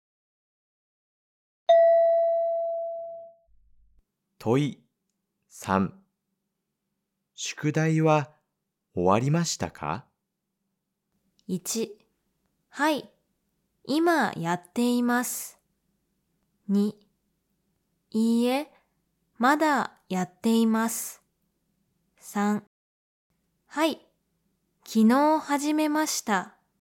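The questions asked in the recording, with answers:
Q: 宿題は終わりましたか?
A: 2: いいえ、まだやっています。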